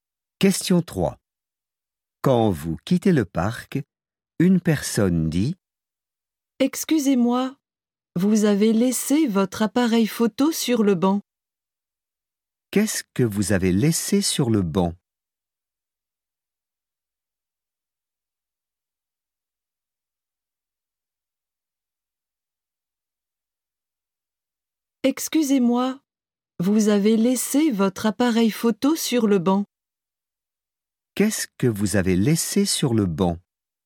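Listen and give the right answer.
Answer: Votre appareil photo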